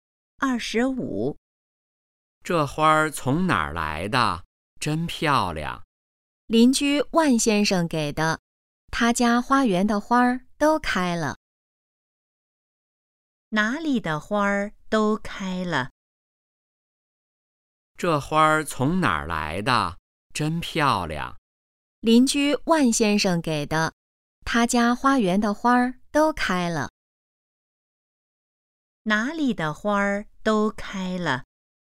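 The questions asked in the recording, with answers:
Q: 哪里的花都开了?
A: 邻居万先生家花园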